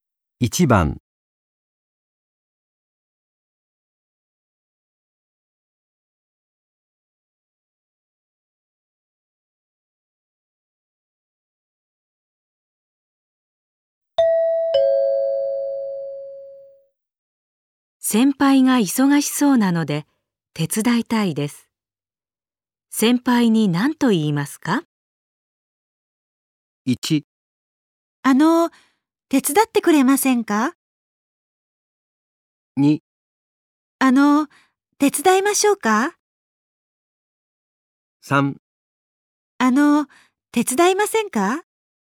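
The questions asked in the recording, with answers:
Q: 先輩が忙しそうなので手伝いたいです。先輩に何と言いますか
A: 2: 手伝いましょうか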